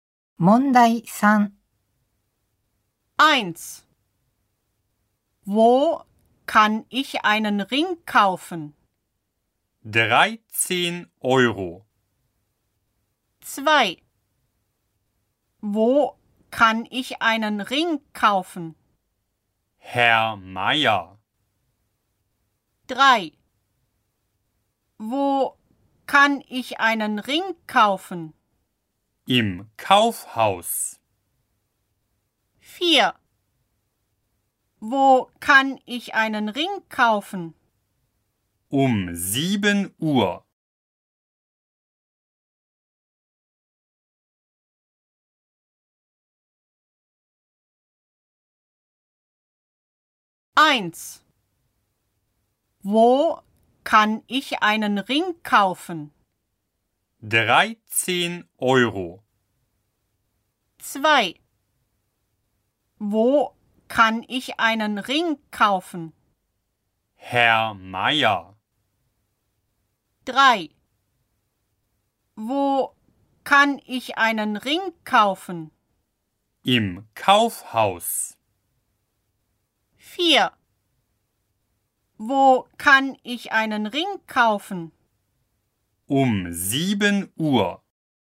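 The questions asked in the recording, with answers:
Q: Wo kann ich einen Ring kaufen?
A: 3: Im Kaufhaus.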